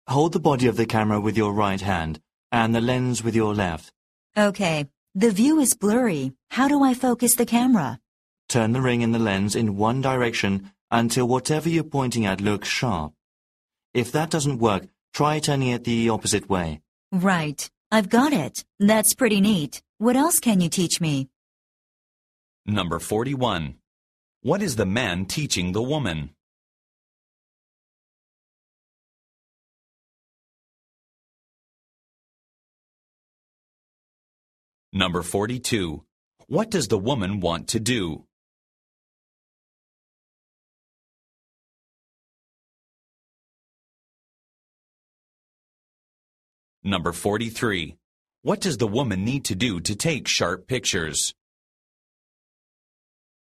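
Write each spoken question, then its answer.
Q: What is the man teaching the woman?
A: How to use a camera

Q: What does the woman need to do to take sharp pictures?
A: Turn the ring on the lens until the image looks sharp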